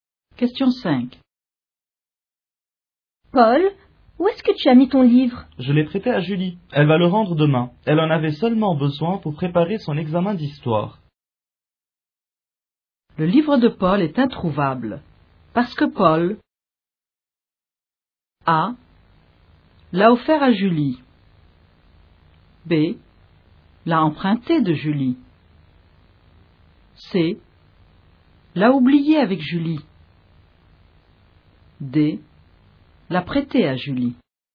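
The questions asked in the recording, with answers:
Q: Le livre de Paul est introuvable. Parce que Paul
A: D: L'a prêté à Julie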